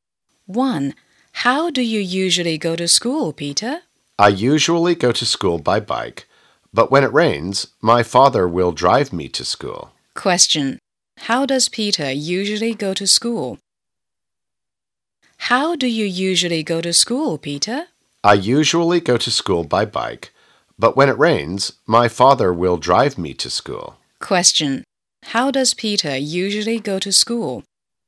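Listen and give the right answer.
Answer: By bike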